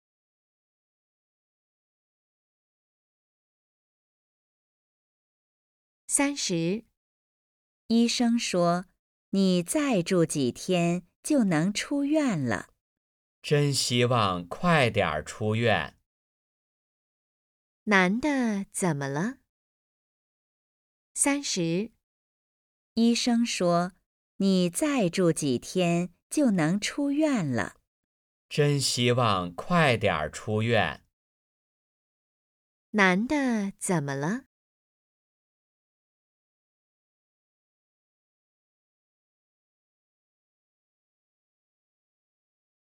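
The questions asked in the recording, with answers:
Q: 男的怎么了?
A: 生病住院了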